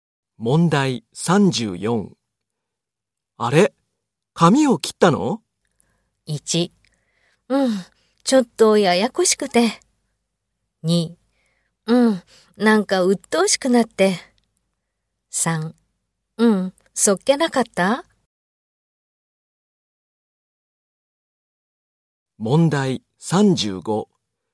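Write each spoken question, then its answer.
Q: あれ、髪を切ったの?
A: 2: うん、なんか鬱陶しくなって。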